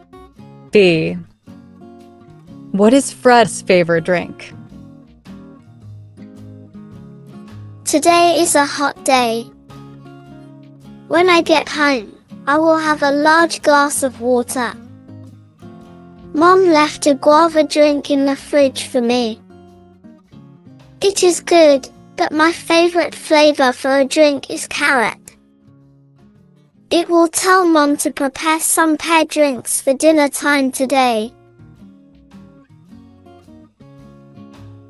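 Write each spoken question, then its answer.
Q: What is Fred's favorite drink?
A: carrot drink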